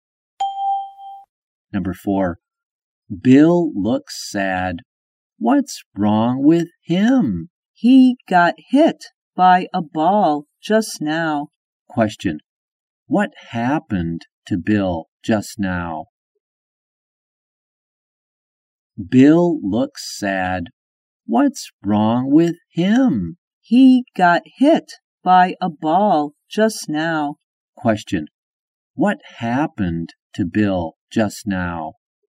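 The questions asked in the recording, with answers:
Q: What happened to Bill just now?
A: He got hit by a ball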